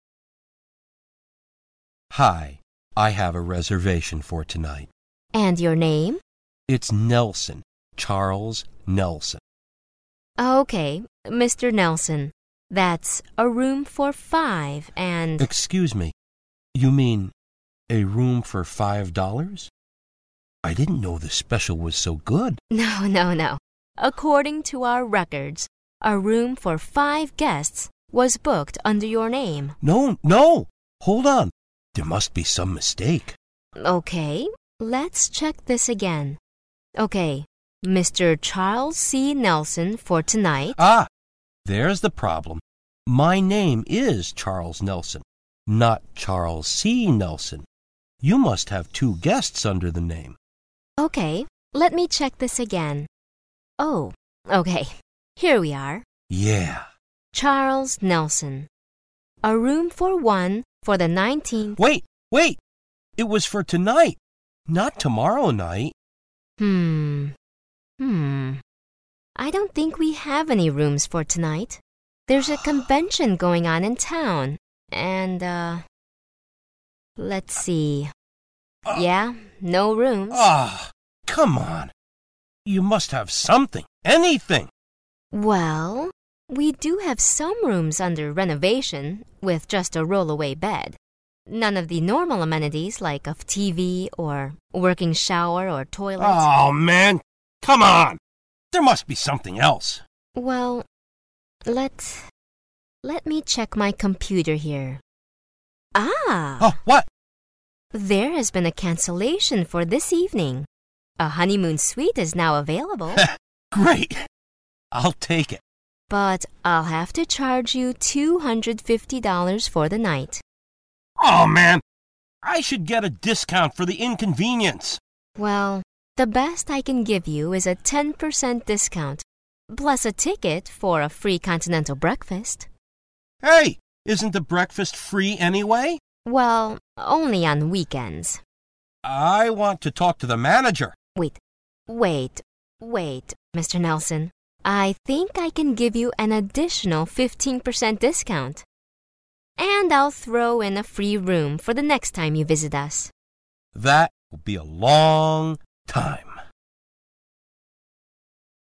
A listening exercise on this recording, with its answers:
What is the first problem with the man's reservation?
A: The hotel confused him with another guest.

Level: 专业四级